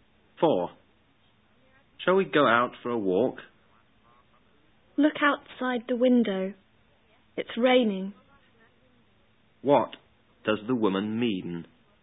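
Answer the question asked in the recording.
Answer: They can't go for a walk because it's raining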